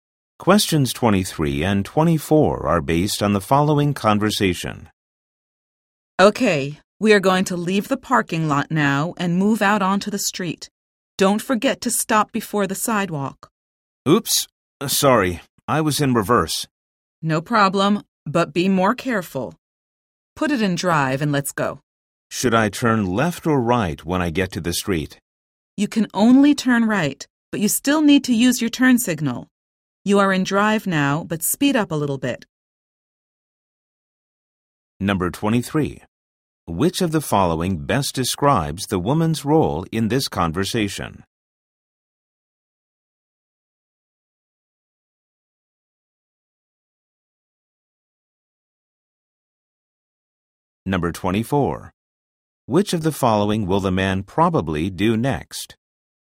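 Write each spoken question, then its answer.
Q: Which of the following best describes the woman's role in this conversation?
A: Driving instructor

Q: Which of the following will the man probably do next?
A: Speed up and turn right using the turn signal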